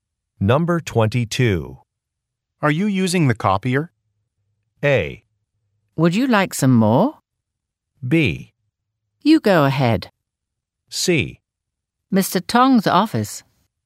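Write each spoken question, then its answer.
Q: Are you using the copier?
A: B: You go ahead.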